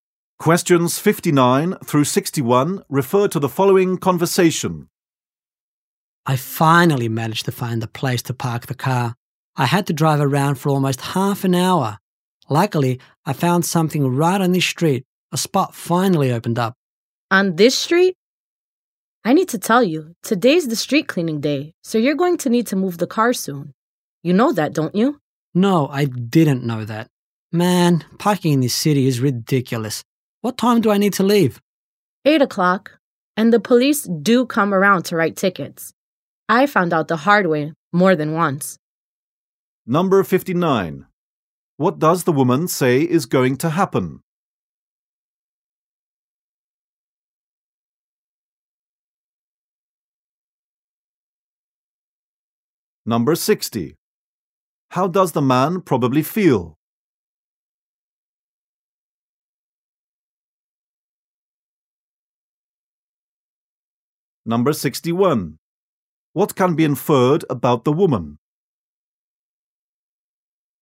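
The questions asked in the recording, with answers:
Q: What does the woman say is going to happen?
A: The street will be cleaned, so the car must be moved by 8

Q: How does the man probably feel?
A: Frustrated

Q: What can be inferred about the woman?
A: She has gotten parking tickets before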